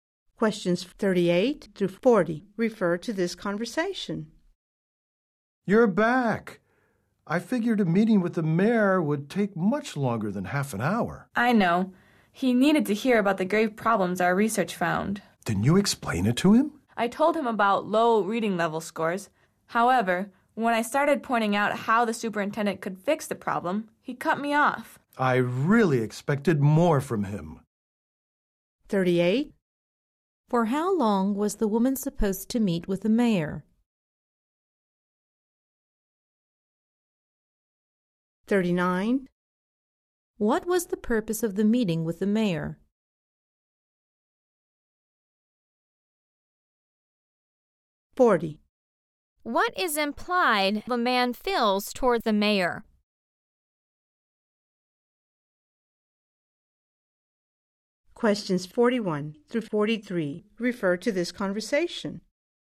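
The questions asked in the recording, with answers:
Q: What was the purpose of the meeting with the mayor?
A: To tell him about the problems the research found (low reading scores)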